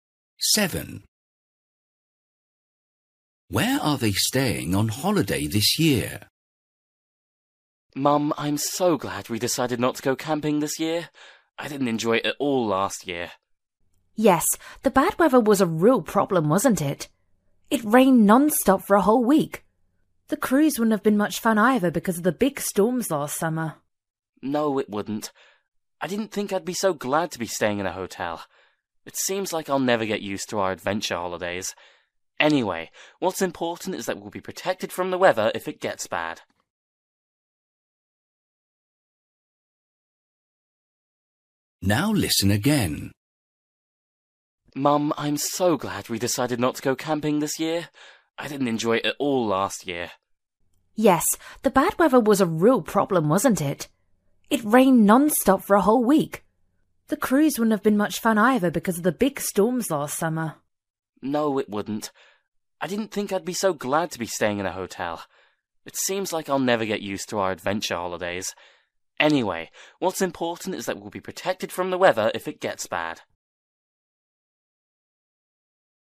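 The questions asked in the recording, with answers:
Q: Where are they staying on holiday this year?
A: In a hotel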